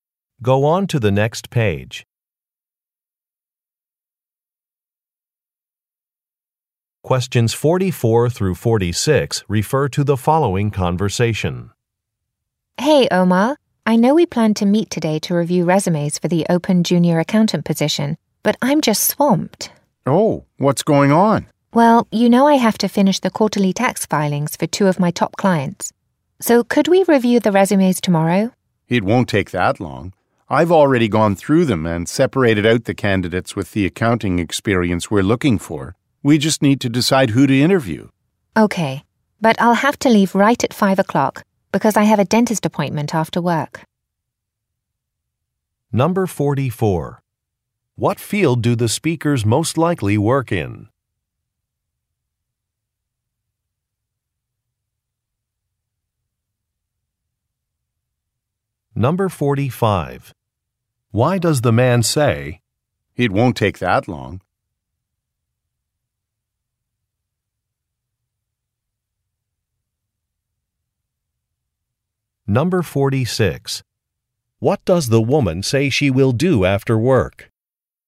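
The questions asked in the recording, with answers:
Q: What field do the speakers most likely work in?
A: Accounting

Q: What does the woman say she will do after work?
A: Go to a dentist appointment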